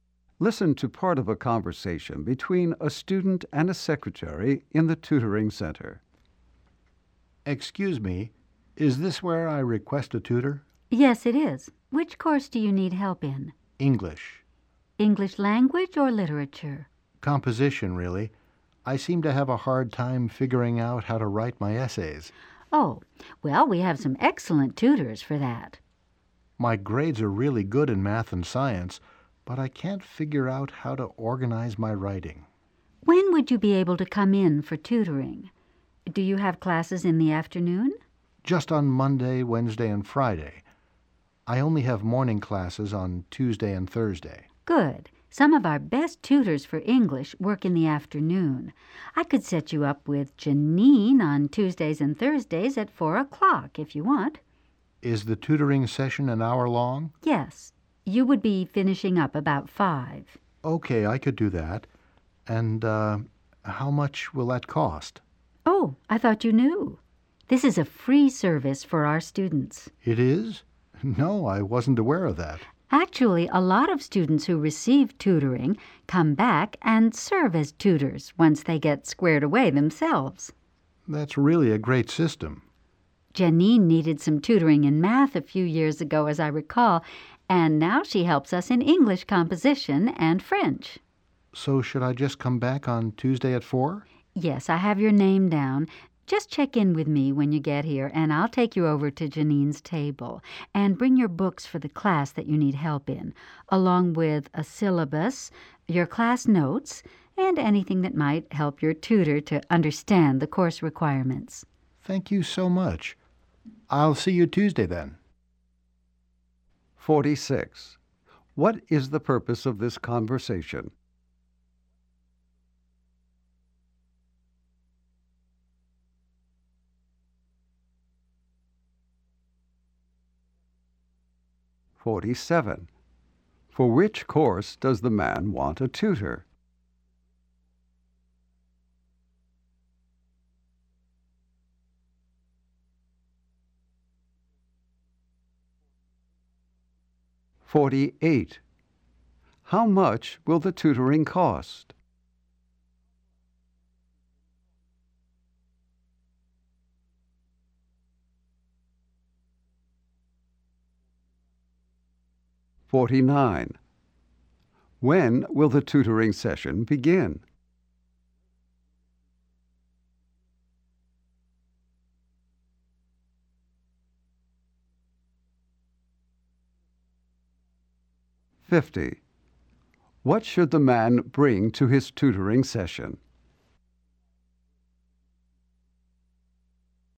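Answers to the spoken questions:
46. To arrange tutoring
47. English composition
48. Nothing; it is free
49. Tuesday at 4 o'clock
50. His books, the syllabus and his class notes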